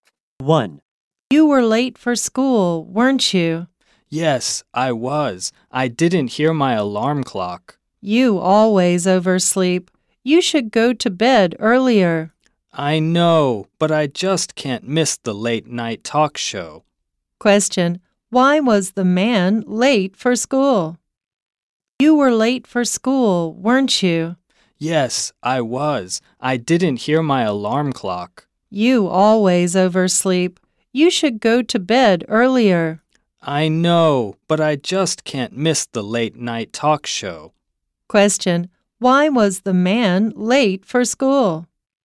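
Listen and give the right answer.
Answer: He didn't hear his alarm clock because he stayed up watching a late night talk show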